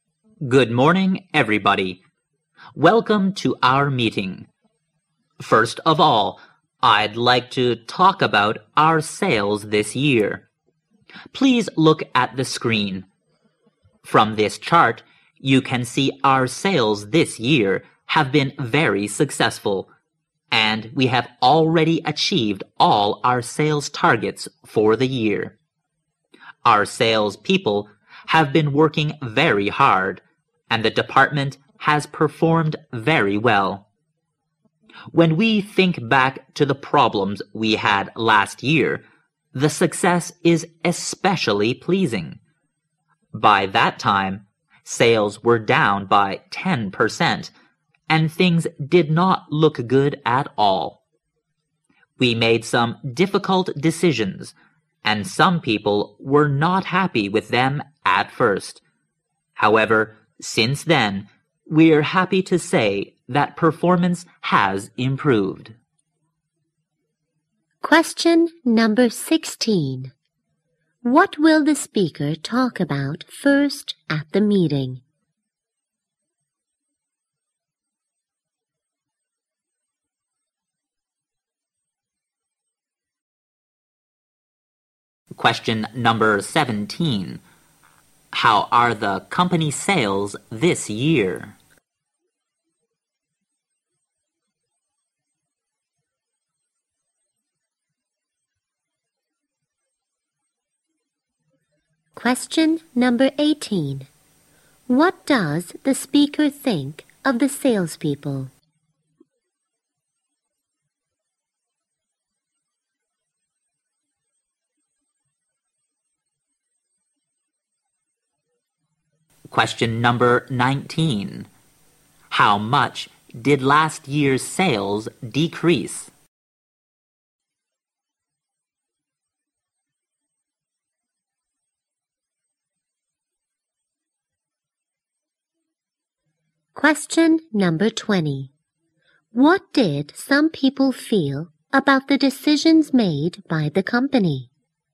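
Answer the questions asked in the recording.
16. Sales this year
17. Very successful
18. They have been working very hard
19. By 10%
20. Not happy at first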